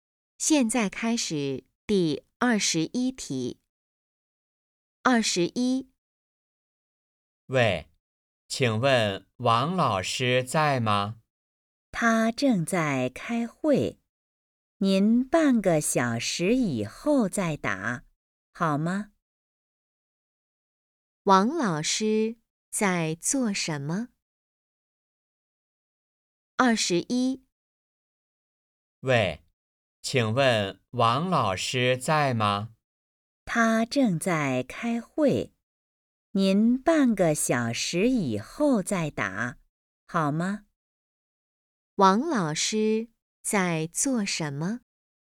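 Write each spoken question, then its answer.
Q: 王老师在做什么?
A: 开会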